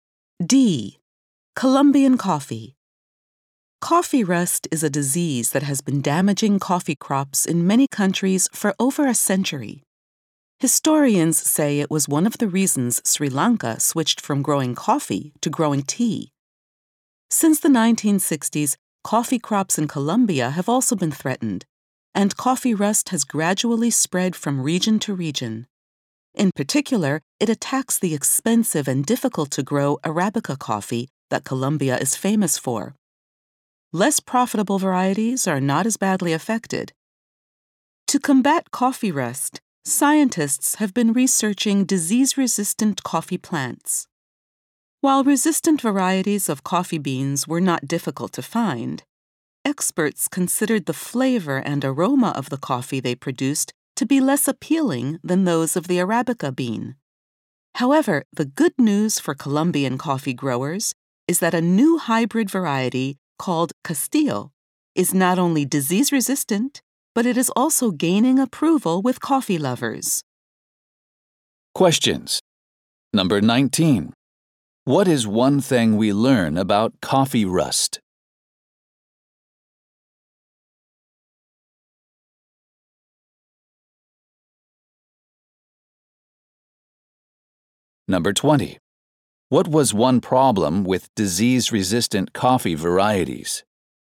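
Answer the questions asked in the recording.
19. It especially attacks Arabica coffee, and it helped cause Sri Lanka to switch from coffee to tea.
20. Their flavor and aroma were considered less appealing than Arabica's.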